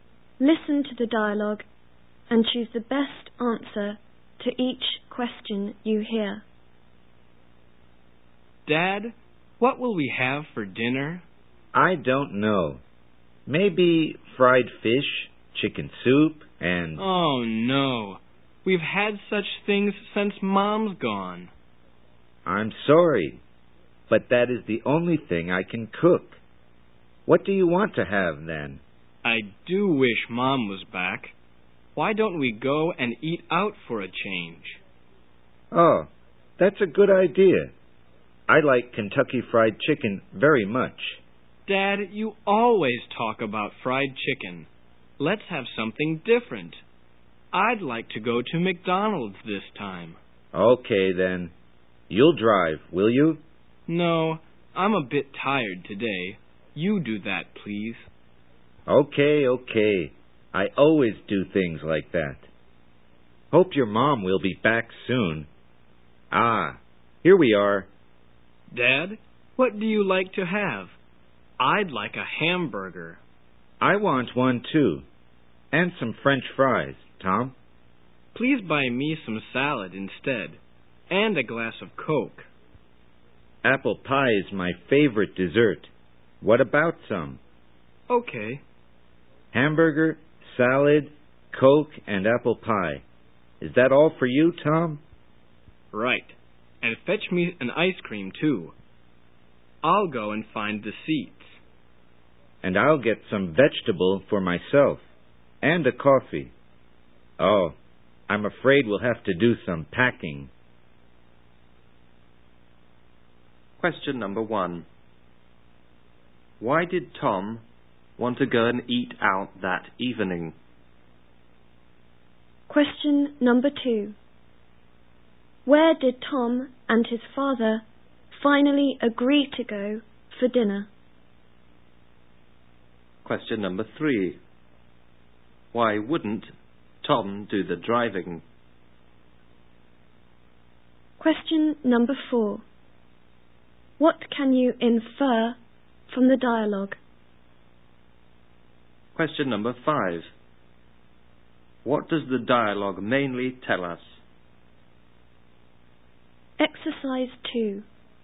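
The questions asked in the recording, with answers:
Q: Where did Tom and his father finally agree to go for dinner?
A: McDonald's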